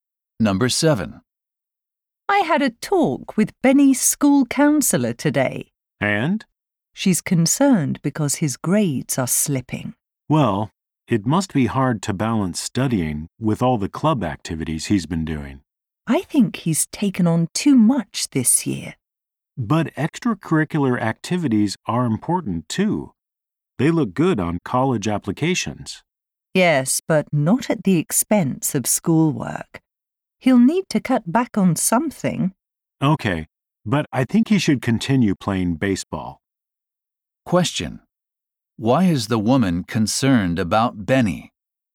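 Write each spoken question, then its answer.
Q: Why is the woman concerned about Benny?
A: His grades are slipping because he is doing too many activities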